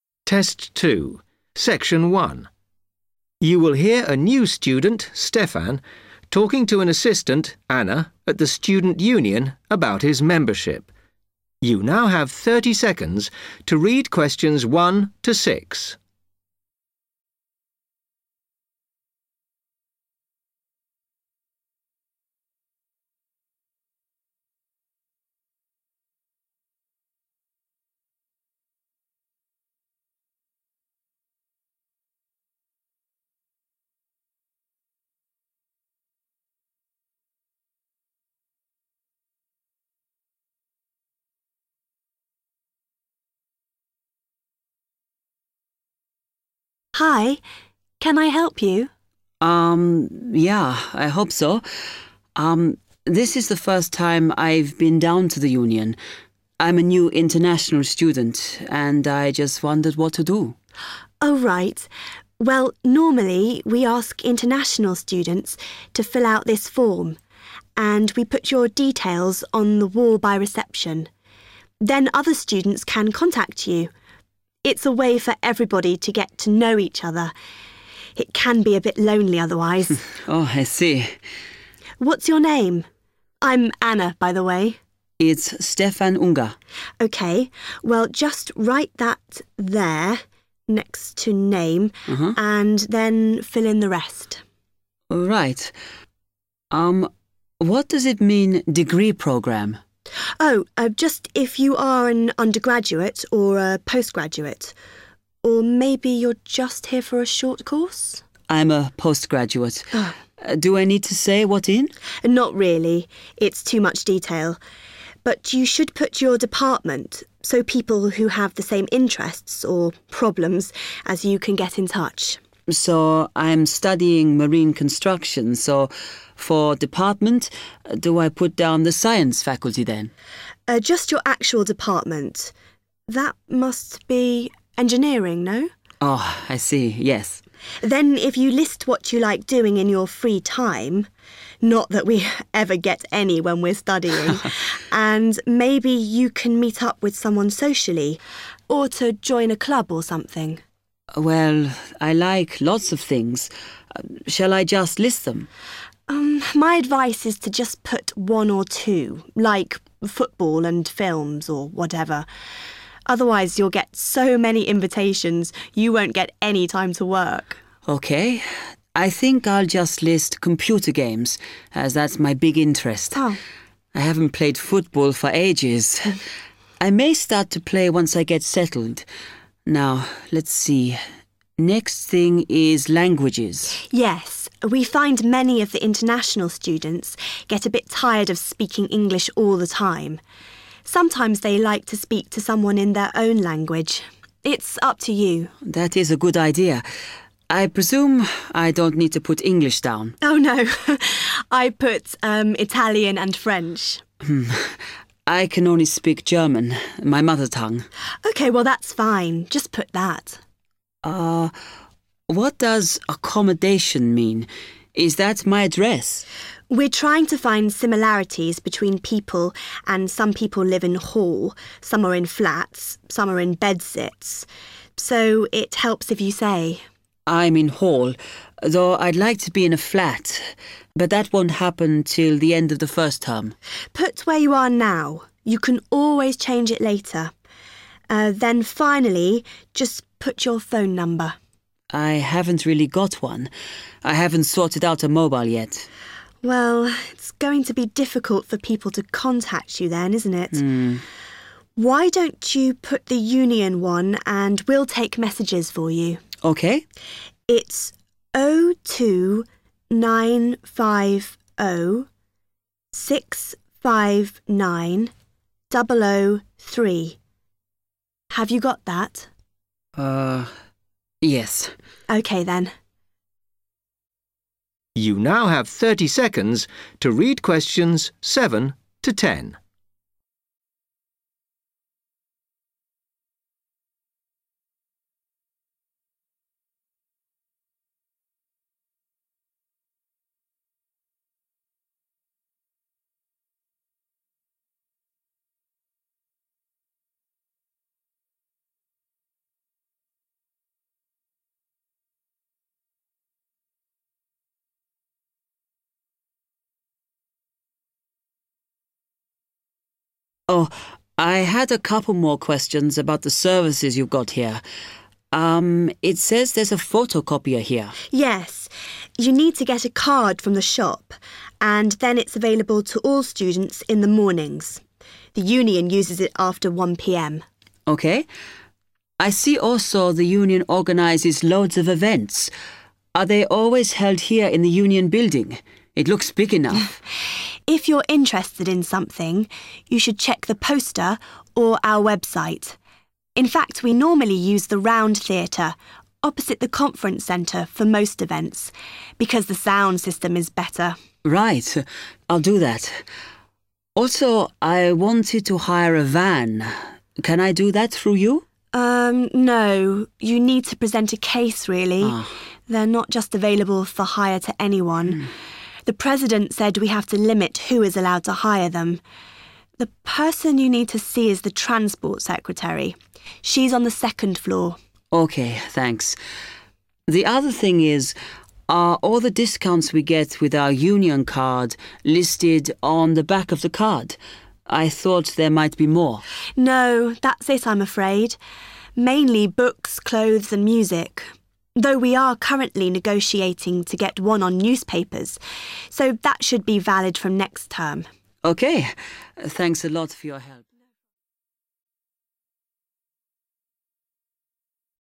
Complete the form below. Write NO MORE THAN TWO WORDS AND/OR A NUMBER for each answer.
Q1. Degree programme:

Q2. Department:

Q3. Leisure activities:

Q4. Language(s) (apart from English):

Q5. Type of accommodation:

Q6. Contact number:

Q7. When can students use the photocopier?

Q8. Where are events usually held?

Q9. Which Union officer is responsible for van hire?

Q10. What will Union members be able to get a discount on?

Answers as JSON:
{"1": "postgraduate", "2": "engineering", "3": "computer games", "4": "German", "5": "in Hall / Hall", "6": "0295069003", "7": "in the mornings / mornings / the mornings", "8": "the Round Theatre / Round Theatre / the Round theater / Round theater", "9": "the Transport Secretary / Transport Secretary", "10": "newspapers"}

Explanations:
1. The correct answer is "postgraduate" because when Stefan asks Anna what to write for "degree programme", Anna explains that it means undergraduate, postgraduate, or a short course. Stefan immediately replies, "I'm a postgraduate."
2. The correct answer is "engineering" because Stefan asks what to put for "Department" since he is studying Marine Construction. Anna clarifies that he should write his specific department, which is "Engineering", and Stefan agrees.
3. The correct answer is "computer games" because when Anna asks Stefan to write down what he enjoys doing in his free time (which means leisure activities), Stefan decides to write "computer games" because it is his main hobby and interest.
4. The correct answer is "German" because when filling in the languages section on the form, Stefan explains that he can only speak German, which is his native language (mother tongue). Anna agrees and tells him to write that down.
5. The correct answer is "Hall" (or "in Hall") because the form asks for Stefan's "Type of accommodation" (where he lives). When Stefan asks what type of accommodation means, Anna gives examples like living in a "Hall", "flats", or "bed-sits". Stefan states, "I'm in Hall," and Anna tells him to "Put where you are now." Therefore, "Hall" is the correct type of accommodation.
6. The correct answer is given when Stefan mentions that he does not have a mobile phone number yet. Anna suggests using the Student Union's phone number and provides it directly: 02950 659003.
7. The correct answer is "(in the) mornings" because when Stefan asks about using the photocopier, Anna clearly explains that students can use it during the morning hours (the phrase "available to all students in the mornings" means they can use it at this time).
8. The correct answer is confirmed when Stefan asks if events are always held in the Union building. Anna clarifies that for most events, they "normally use the Round Theatre" because it has a better sound system. The word "normally" matches the question's word "usually". Therefore, "Round Theatre" is the correct location.
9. The correct answer is confirmed when Stefan asks about hiring a van. Anna explains that van hiring is limited and explicitly states that the officer or person to talk to for this is the "Transport Secretary".
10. The correct answer is supported by Anna's response when Stefan asks about discounts provided with the Union card. She mentions the current discounts and then states that they are trying to arrange a discount on "newspapers," which will be available starting next term.

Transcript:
Anna: Hi, can I help you?
Stefan: Um – yeah, I hope so. Erm – this is the first time I've been down to the Union – I'm a new international student – and I just wondered what to do.
Anna: Oh right. Well, normally we ask international students to fill out this form and we put your details on the wall by reception. Then other students can contact you – it's a way for everybody to get to know each other. It can be a bit lonely otherwise.
Stefan: Oh I see.
Anna: What's your name? I'm Anna, by the way.
Stefan: It's Stefan Unger.
Anna: OK – well just write that there – next to name – and then fill in the rest.
Stefan: Right. Um – what does it mean degree programme?
Anna: Oh, just if you are an undergraduate or a post-graduate – or maybe you're just here for a short course?
Stefan: I'm a postgraduate. Do I need to say what in?
Anna: Not really – it's too much detail. But you should put your department so people who have the same interests – or problems – as you can get in touch.
Stefan: So I'm studying Marine Construction so, for Department, do I put down the Science faculty then?
Anna: Just your actual Department. That must be Engineering, no?
Anna: Then if you list what you like doing in your free time – not that we ever get any when we're studying – and maybe you can meet up with someone socially or to join a club or something.
Stefan: Well, I like lots of things – shall I just list them?
Anna: My advice is to just put one or two like football and films or whatever. Otherwise you'll get so many invitations you won't get any time to work!
Stefan: OK – I think I'll just list computer games as that's my big interest. I haven't played football for ages. I may start to play once I get settled. Now, let's see – next thing is languages.
Anna: Yes – we find many of the international students get a bit tired of speaking English all the time – sometimes they like to speak to someone in their own language. It's up to you.
Stefan: That is a good idea. I presume I don't need to put English down?
Anna: Oh no – (laughs) – I put – um – Italian and French.
Stefan: Hm – I can only speak German – my mother tongue.
Anna: OK, well that's fine. Just put that.
Stefan: What does accommodation mean? Is that my address?
Anna: We're trying to find similarities between people and some people live in Hall, some are in flats, some are in bed-sits – so it helps if you say.
Stefan: I'm in Hall, though I'd like to be in a flat. But that won't happen till the end of the first term.
Anna: Put where you are now. You can always change it later. Then finally just put your phone number.
Stefan: I haven't really got one – I haven't sorted out a mobile yet.
Anna: Well, it's going to be difficult for people to contact you then, isn't it? Why don't you put the Union one and we'll take messages for you.
Stefan: OK.
Anna: It's 02950 659003. Have you got that?
Stefan: Yes.
Anna: OK, then.
Stefan: Oh I had a couple more questions about the services you've got here. Um – it says there's a photocopier here ...
Anna: Yes. You need to get a card from the shop – and then it's available to all students in the mornings. The Union uses it after 1.00 pm.
Stefan: OK. I see also the Union organises loads of events. Are they always held here in the Union building? It looks big enough!
Anna: If you're interested in something, you should check the poster or our website. In fact, we normally use the Round Theatre opposite the Conference Centre for most events because the sound system is better.
Stefan: Right, I'll do that. Also I wanted to hire a van. Can I do that through you?
You need to present a case really – they're not just available for hire to anyone. The President said we have to limit who is allowed to hire them. The person you need to see is the Transport Secretary. She's on the second floor.
Stefan: OK, thanks. The other thing is, are all the discounts we get with our Union card listed on the back of the card? I thought there might be more.
Anna: No, that's it I'm afraid – mainly books, clothes and music. Though we are currently negotiating to get one on newspapers, so that should be valid from next term.
Stefan: OK, thanks a lot ... (fade) ...